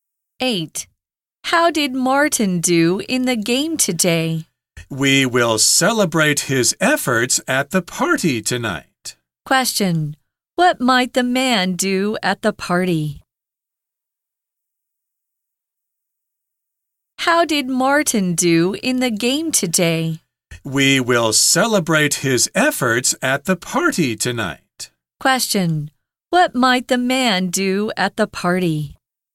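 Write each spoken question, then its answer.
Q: Question. What might the man do at the party?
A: Celebrate Martin's efforts in the game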